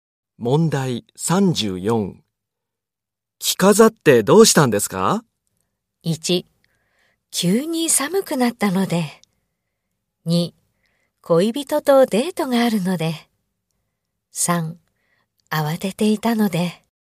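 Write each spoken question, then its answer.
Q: 着飾ってどうしたんですか?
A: 2: 恋人とデートがあるので。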